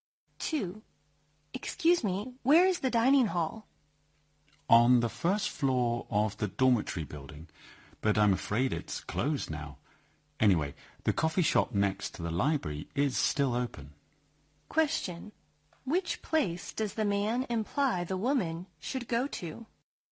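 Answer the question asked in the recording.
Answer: The coffee shop next to the library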